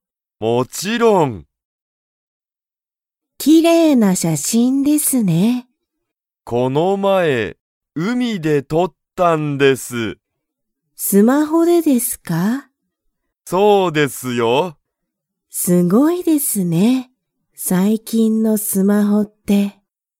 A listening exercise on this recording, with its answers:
Comprehension Quiz (Skip if you don't understand the conversation yet)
その写真(しゃしん)はスマホで撮(と)りましたか?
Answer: はい

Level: Level 1